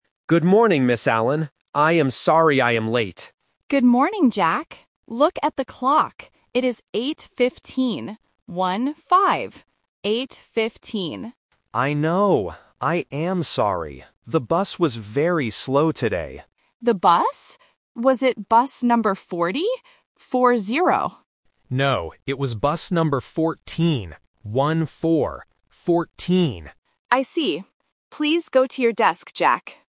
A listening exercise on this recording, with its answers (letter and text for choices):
Listen to the conversation between a student and a teacher. Choose the correct answer (A, B, or C).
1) What time is it now?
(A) 8:50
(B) 8:15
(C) 8:00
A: (B) 8:15

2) Why is the boy late?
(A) He woke up late.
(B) He walked to school.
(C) The bus was slow.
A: (C) The bus was slow.

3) What bus did the boy take?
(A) Bus 14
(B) Bus 40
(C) Bus 4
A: (A) Bus 14

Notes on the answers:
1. The teacher clearly says, "It is eight fifteen. One-five." Option (A) is a classic A1 phonetic trap (fifteen vs. fifty). Option (C) is a normal school start time but is not mentioned.
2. The boy gives his reason clearly: "The bus was very slow today." Options (A) and (B) are plausible reasons for being late to school, but they are not mentioned in the audio.
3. The boy says, "No, it was bus number fourteen. One-four." Option (B) is the trap because the teacher asks if he took bus forty, but he rejects it. Option (C) is a phonetic trap.

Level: A1